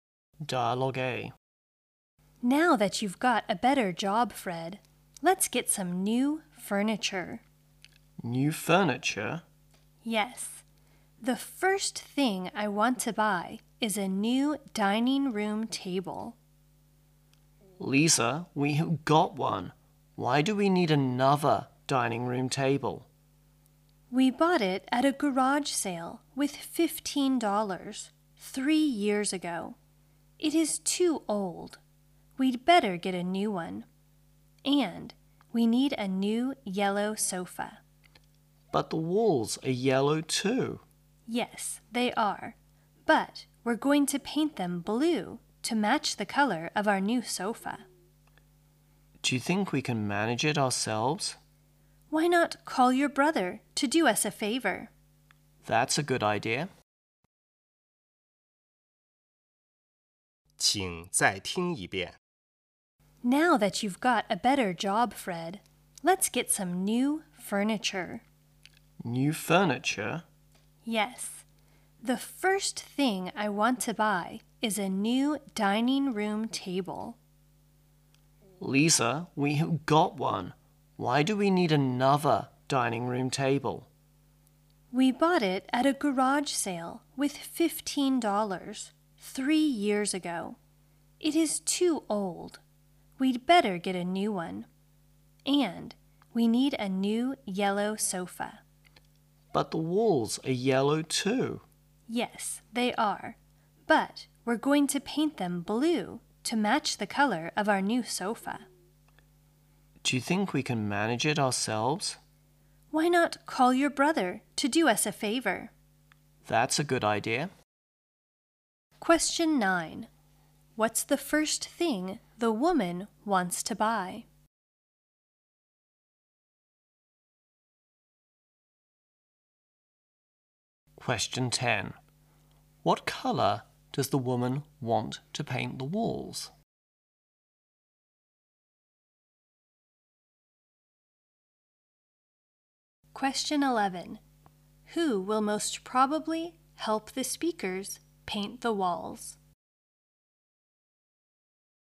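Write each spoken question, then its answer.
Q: What's the first thing the woman wants to buy?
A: A new dining room table.

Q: What color does the woman want to paint the walls?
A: Blue.

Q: Who will most probably help the speakers paint the walls?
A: Fred's brother.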